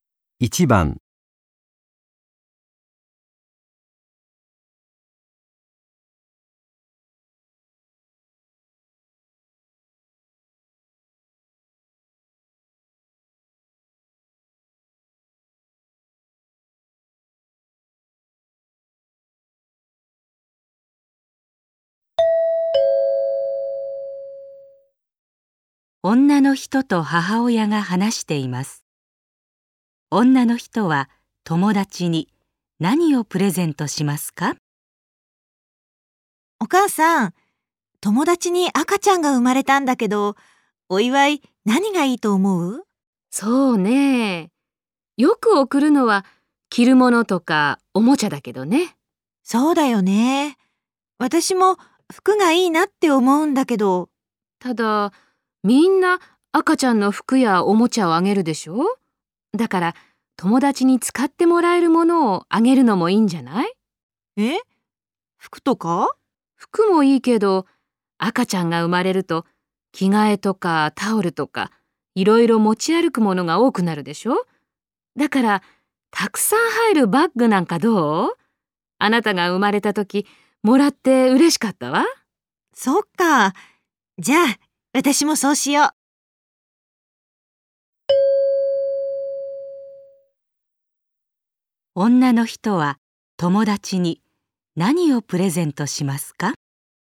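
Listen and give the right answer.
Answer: たくさん入るバッグ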